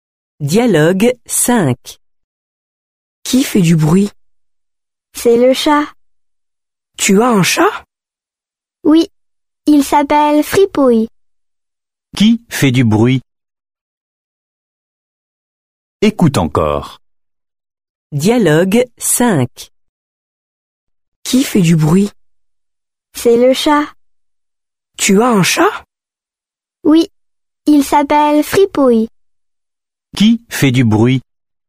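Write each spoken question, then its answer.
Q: Qui fait du bruit?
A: Le chat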